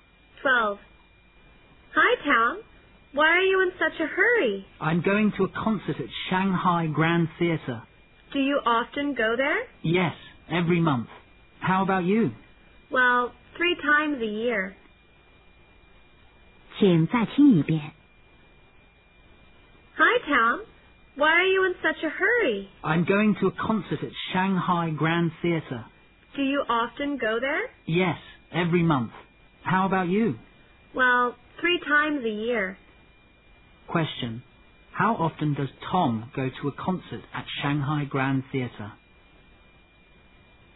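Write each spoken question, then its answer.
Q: How often does Tom go to a concert at Shanghai Grand Theatre?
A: Every month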